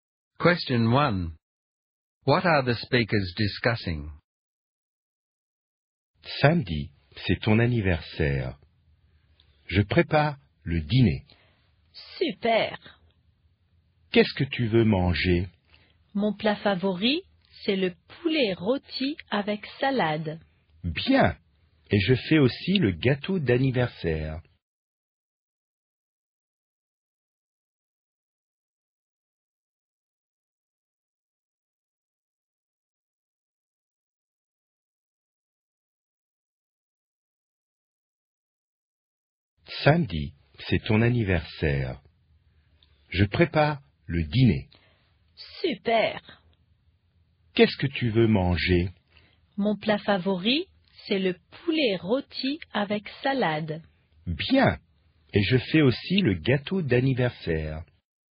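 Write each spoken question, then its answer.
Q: What are the speakers discussing?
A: Plans for a birthday dinner on Saturday (roast chicken with salad and a birthday cake)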